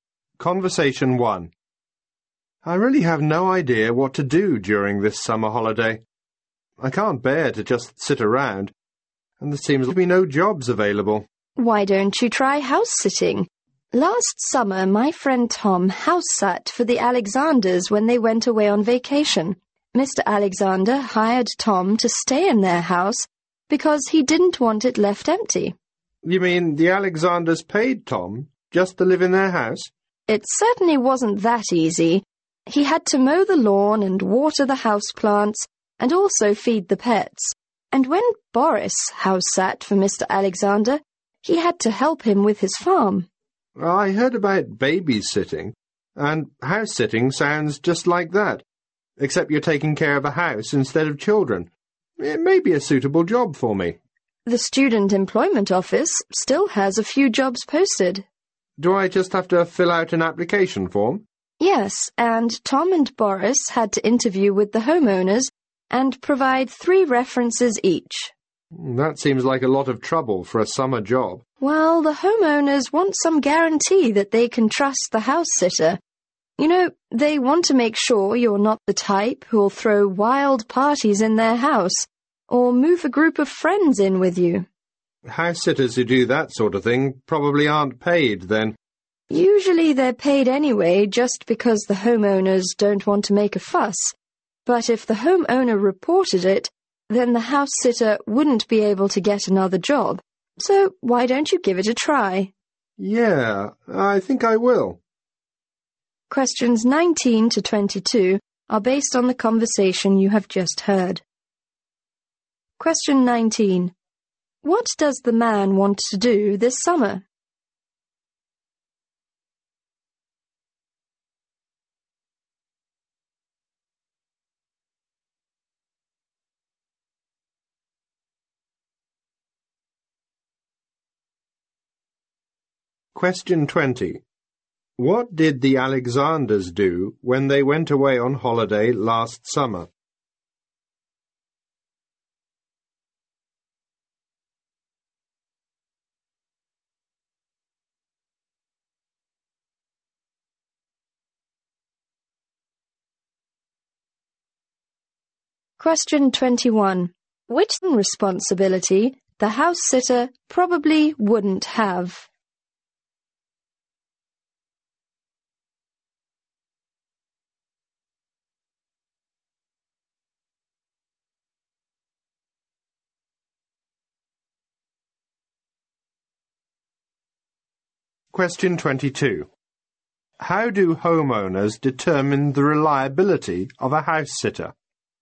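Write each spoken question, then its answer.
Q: What does the man want to do this summer?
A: Find a summer job.

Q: What did the Alexanders do when they went away on holiday last summer?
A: They hired Tom to stay in and look after their house.

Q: How do homeowners determine the reliability of a house-sitter?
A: Through interviews and three references.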